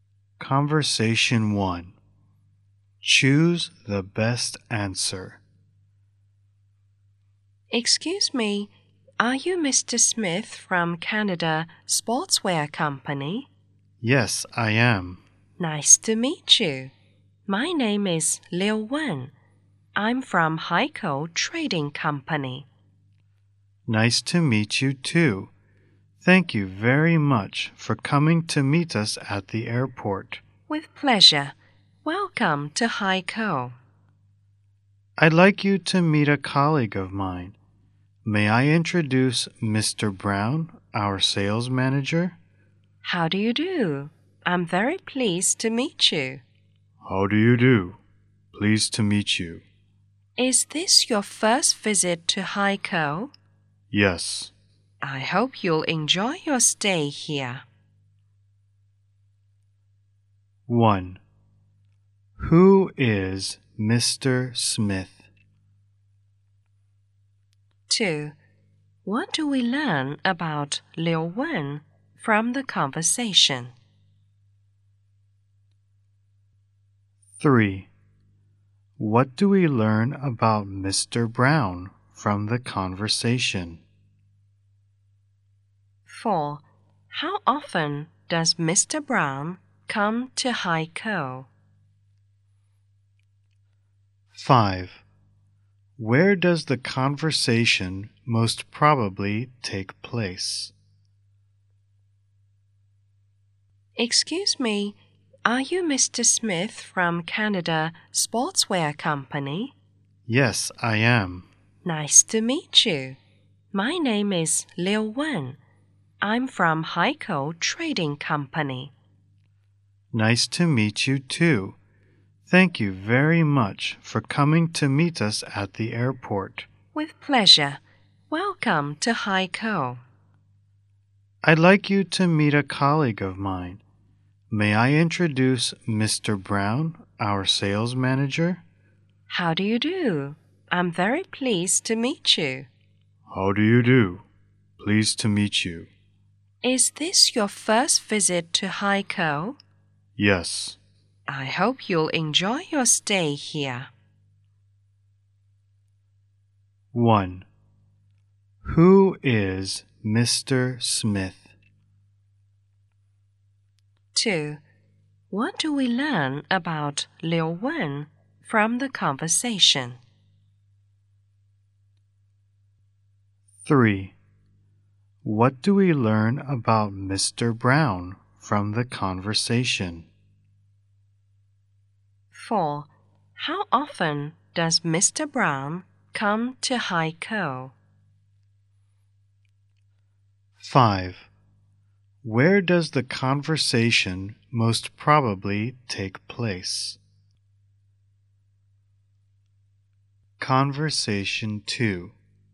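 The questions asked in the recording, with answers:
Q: Who is Mr. Smith?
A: Someone from Canada Sportswear Company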